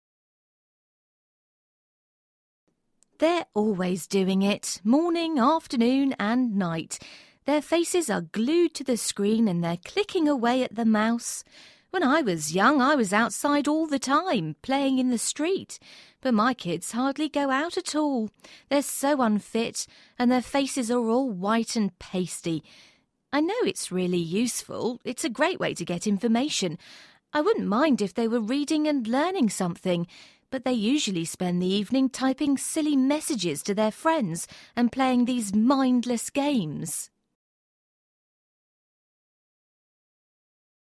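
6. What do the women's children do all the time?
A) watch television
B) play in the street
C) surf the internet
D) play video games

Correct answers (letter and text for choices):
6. C) surf the internet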